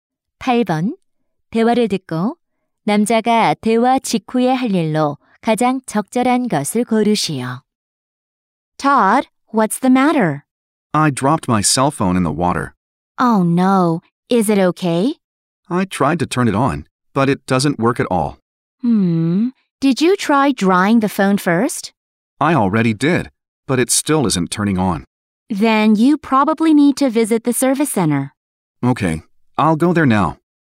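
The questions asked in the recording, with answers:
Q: 대화를 듣고 남자가 대화 직후에 할 일로 가장 적절한 것을 고르시오.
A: 서비스 센터에 가기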